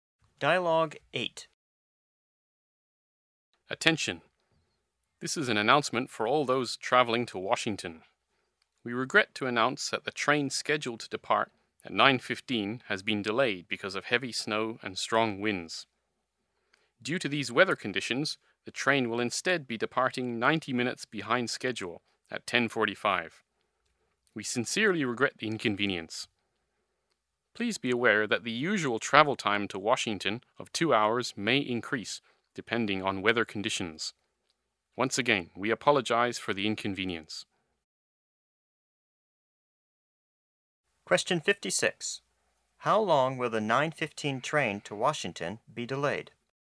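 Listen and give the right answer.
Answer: 90 minutes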